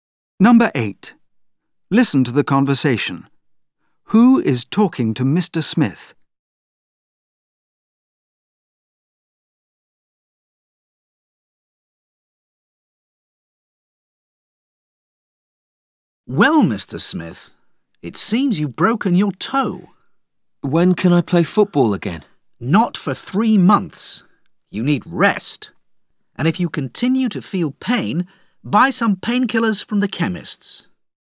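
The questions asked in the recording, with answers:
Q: Who is talking to Mr. Smith?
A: A doctor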